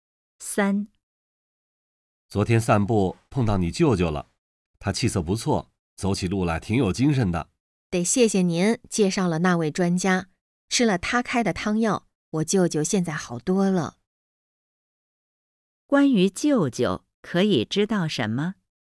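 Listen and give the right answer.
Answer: 吃了专家开的汤药,现在好多了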